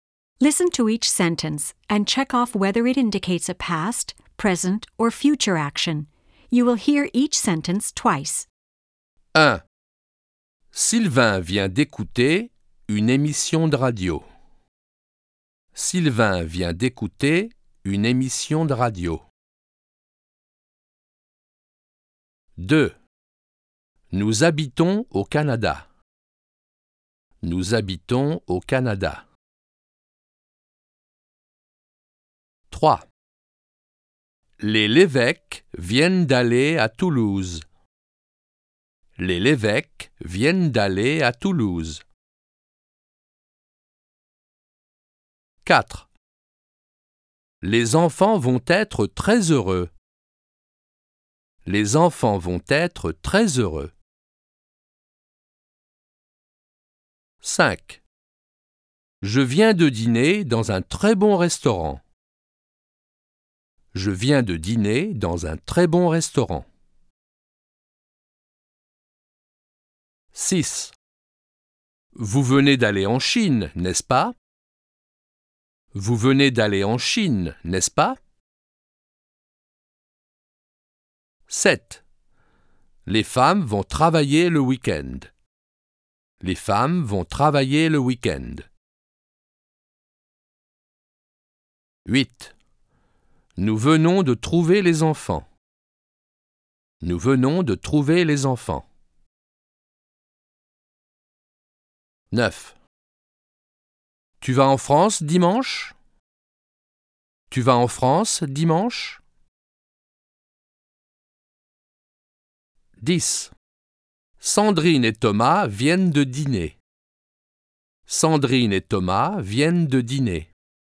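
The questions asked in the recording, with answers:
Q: Sylvain vient d'écouter une émission de radio.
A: passé

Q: Nous habitons au Canada.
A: présent

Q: Les Lévesque viennent d'aller à Toulouse.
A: passé

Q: Les enfants vont être très heureux.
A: futur

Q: Je viens de dîner dans un très bon restaurant.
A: passé

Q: Vous venez d'aller en Chine, n'est-ce pas?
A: passé

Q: Les femmes vont travailler le week-end.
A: futur

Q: Nous venons de trouver les enfants.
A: passé

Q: Sandrine et Thomas viennent de dîner.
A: passé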